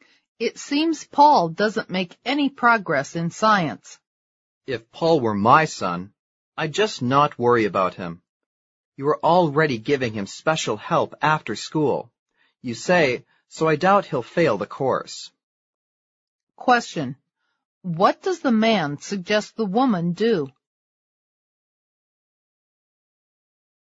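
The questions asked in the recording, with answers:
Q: What does the man suggest the woman do?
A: Not worry about Paul.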